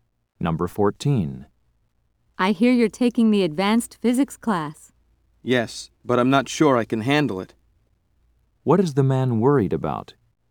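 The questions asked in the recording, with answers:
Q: What is the man worried about?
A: That the advanced physics class may be too hard for him.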